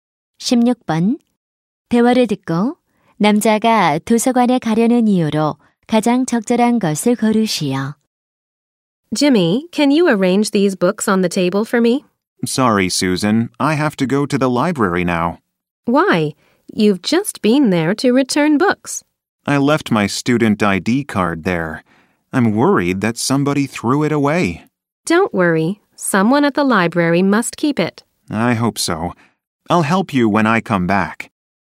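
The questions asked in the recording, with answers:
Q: 대화를 듣고 남자가 도서관에 가려는 이유로 가장 적절한 것을 고르시오.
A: 두고 온 학생증을 찾으려고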